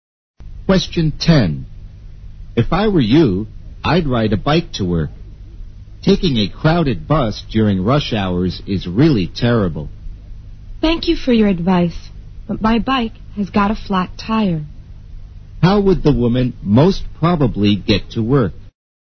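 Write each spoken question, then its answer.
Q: How would the woman most probably get to work?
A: By bus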